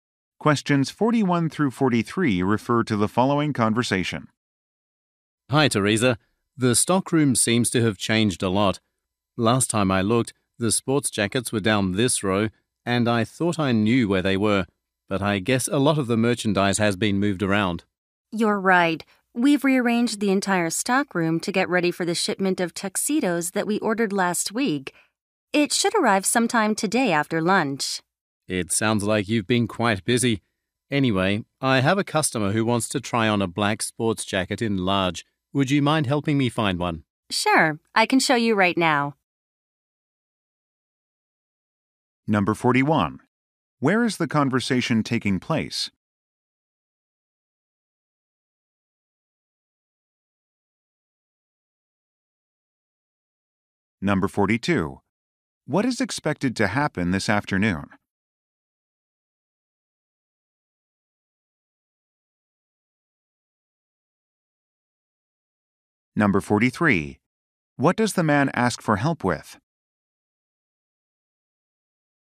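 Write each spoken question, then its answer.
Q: Where is the conversation taking place?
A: In a clothing store's stockroom

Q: What is expected to happen this afternoon?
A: A shipment of tuxedos will arrive

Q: What does the man ask for help with?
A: Finding a large black sports jacket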